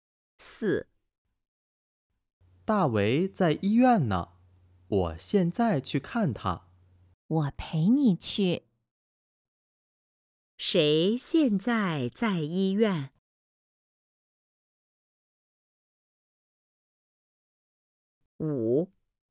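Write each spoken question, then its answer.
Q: 谁现在在医院?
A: 大为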